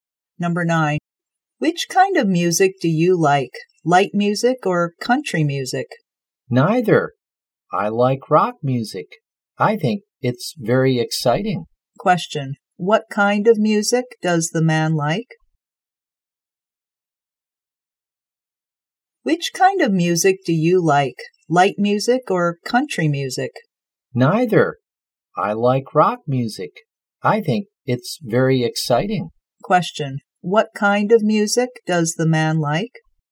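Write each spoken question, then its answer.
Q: What kind of music does the man like?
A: Rock music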